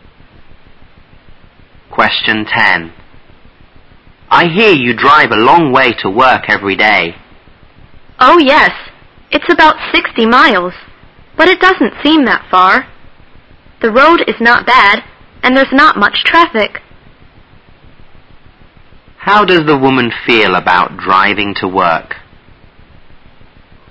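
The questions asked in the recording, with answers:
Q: How does the woman feel about driving to work?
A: She doesn't mind it; it doesn't seem far to her.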